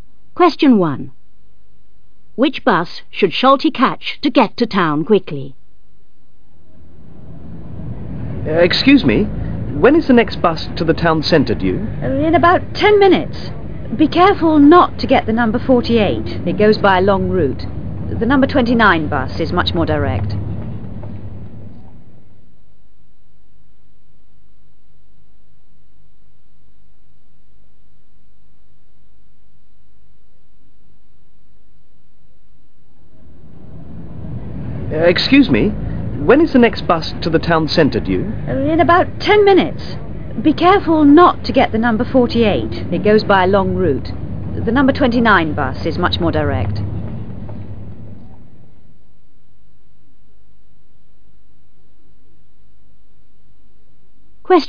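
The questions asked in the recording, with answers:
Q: Which bus should Schulte catch to get to town quickly?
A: The number 29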